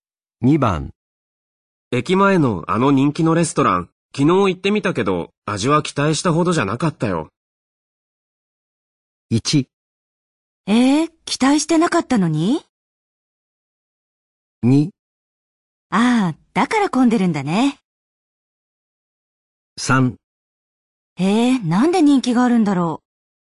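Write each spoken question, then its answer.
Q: 駅前のあの人気のレストラン、昨日行ってみたけど、味は期待したほどじゃなかったよ。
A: 3: なんで人気があるんだろう。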